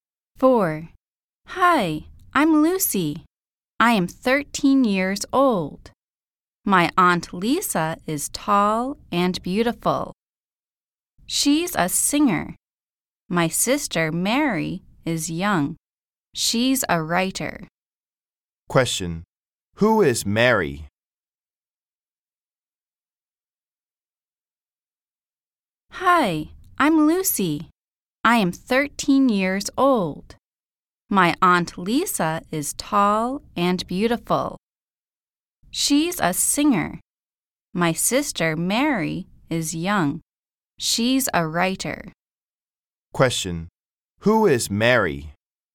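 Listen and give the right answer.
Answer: Lucy's sister, a writer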